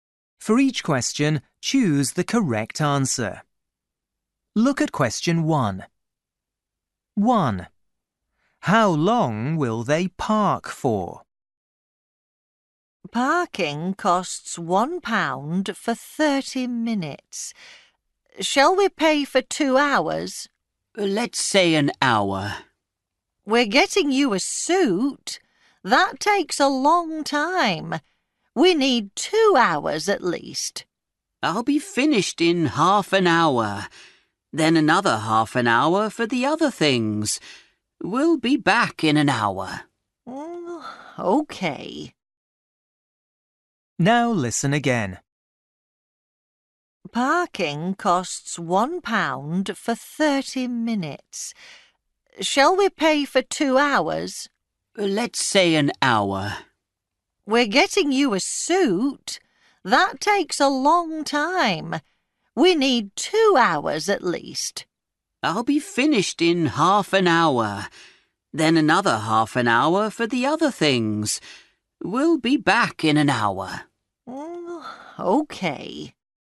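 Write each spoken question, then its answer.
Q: How long will they park for?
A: an hour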